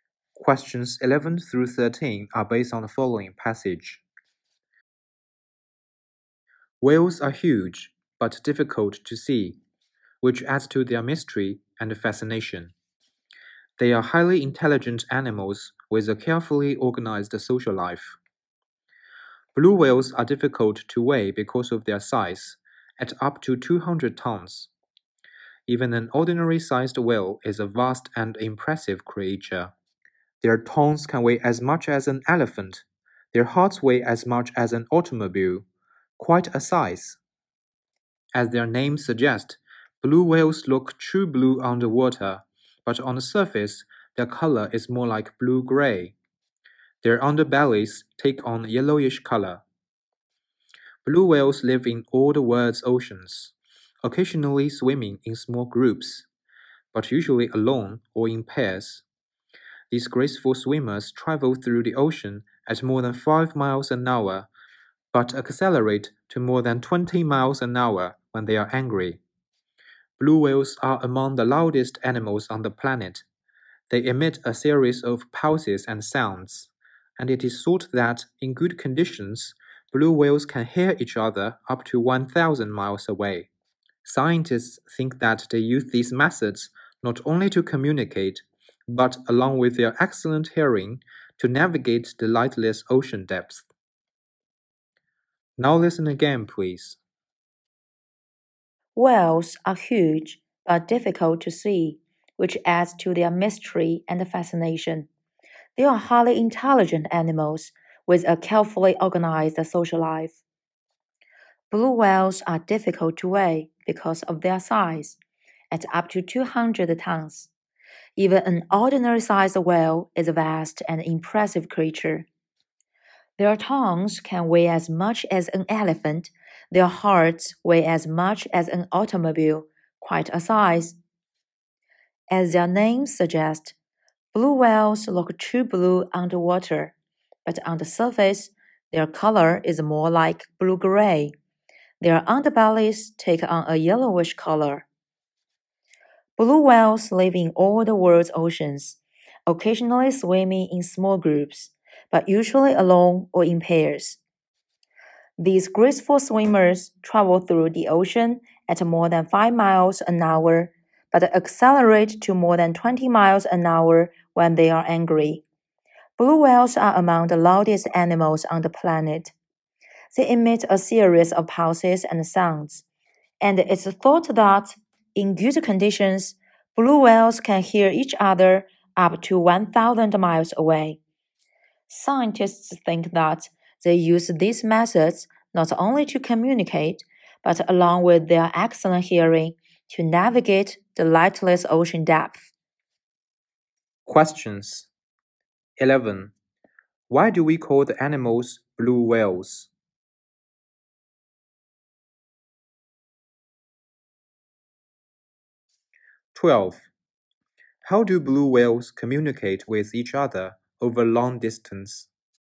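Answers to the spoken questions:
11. They look true blue underwater
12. By emitting pulses and sounds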